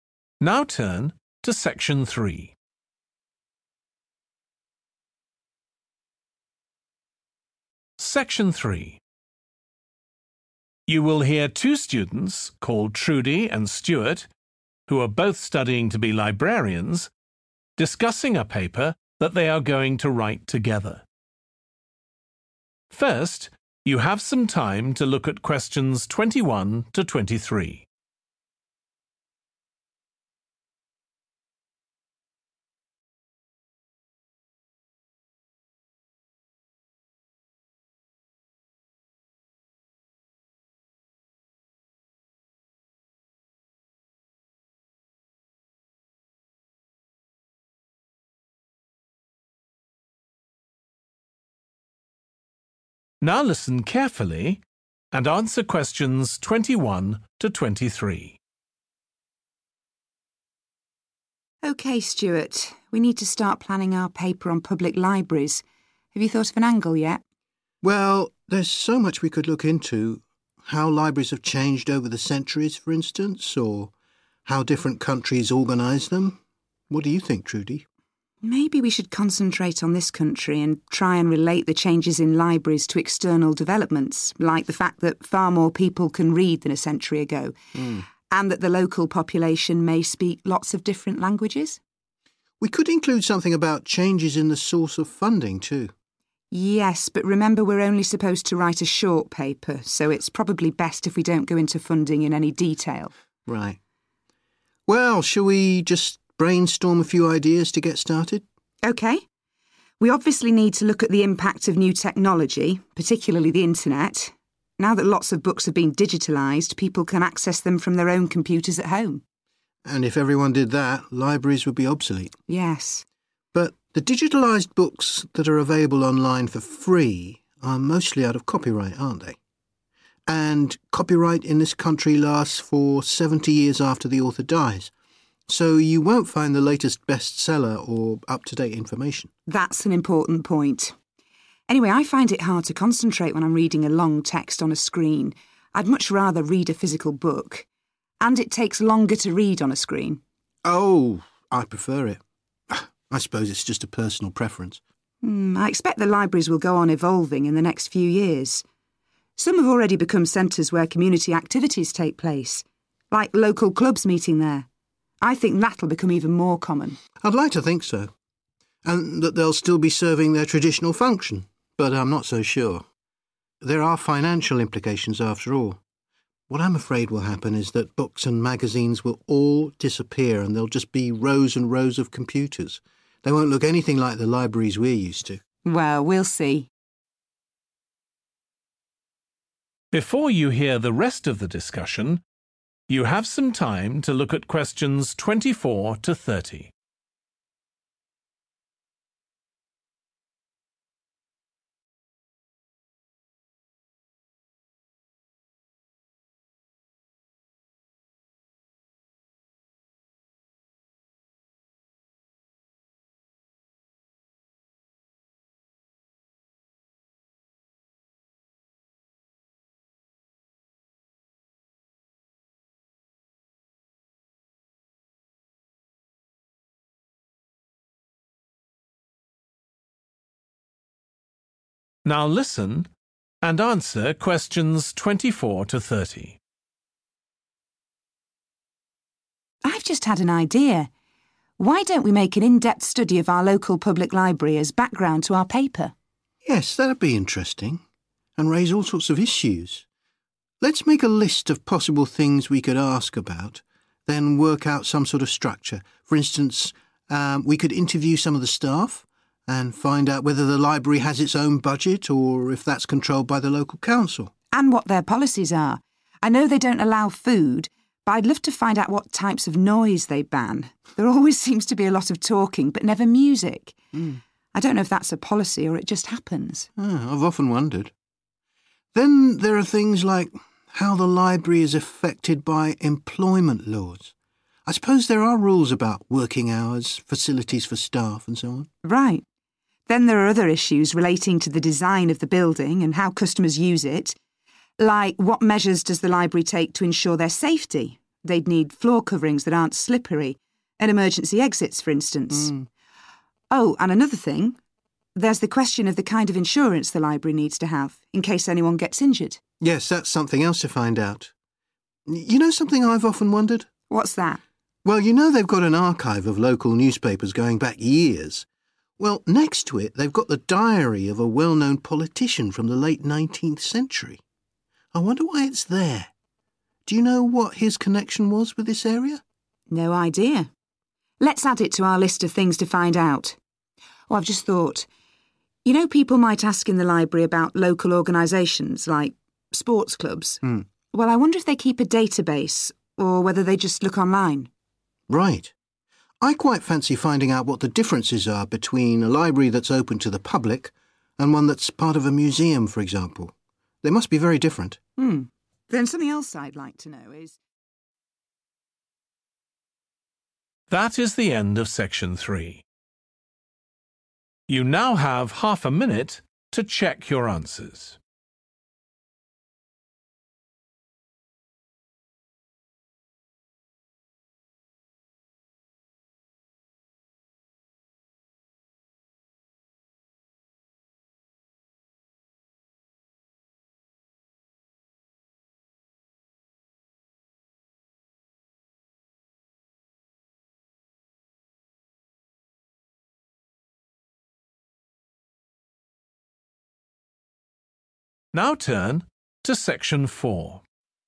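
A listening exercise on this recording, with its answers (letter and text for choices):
Choose the correct letter A, B or C.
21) What will be the main topic of Trudie and Stewart's paper?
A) how public library services are organized in different countries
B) how changes in society are reflected in public libraries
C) how the funding of public libraries has changed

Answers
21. B) how changes in society are reflected in public libraries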